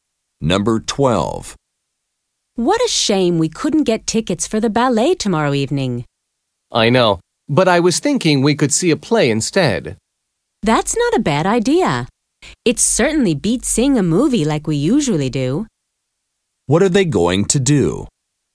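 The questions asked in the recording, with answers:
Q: What are they going to do?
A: See a play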